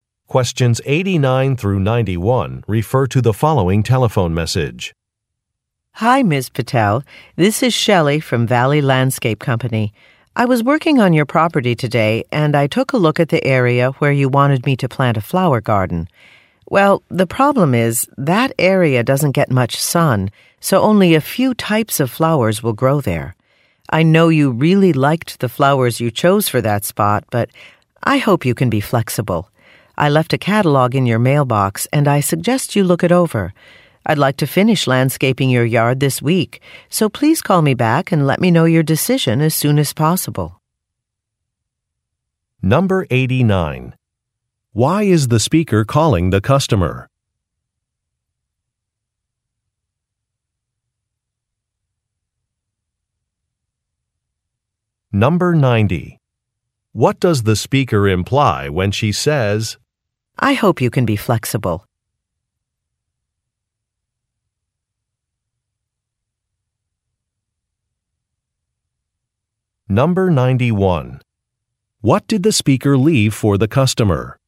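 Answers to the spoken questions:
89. To report a problem: the garden area doesn't get much sun, so only a few types of flowers will grow there
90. The customer may need to pick different flowers
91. A catalog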